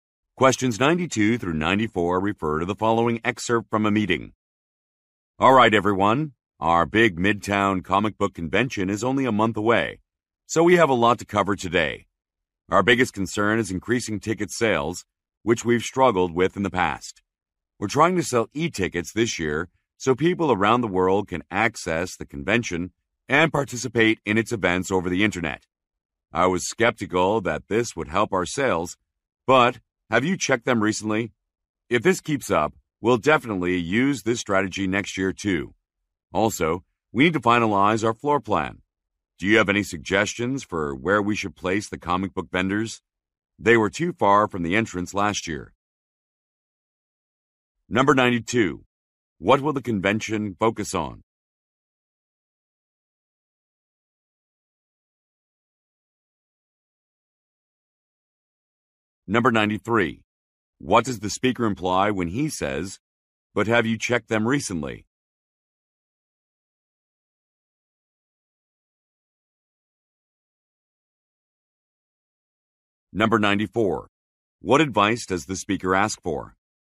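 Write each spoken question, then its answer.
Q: What will the convention focus on?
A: Comic books

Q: What does the speaker imply when he says, "But have you checked them recently?"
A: Ticket sales have increased

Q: What advice does the speaker ask for?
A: Where to place the comic book vendors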